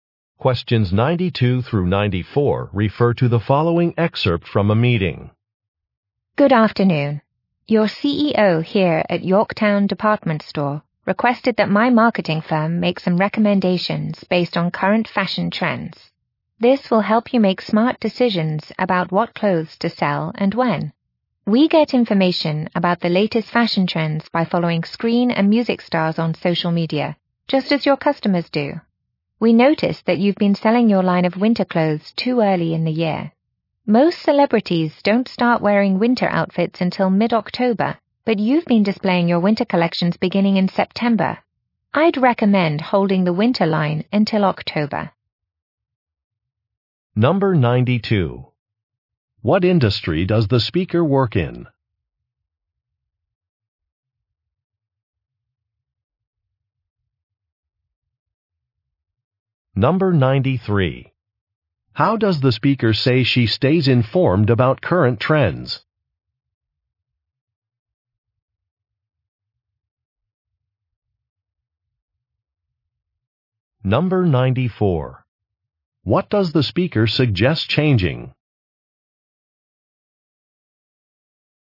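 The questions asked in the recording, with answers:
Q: What industry does the speaker work in?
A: Marketing

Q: How does the speaker say she stays informed about current trends?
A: By following celebrities on social media

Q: What does the speaker suggest changing?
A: When winter clothes are displayed (wait until October)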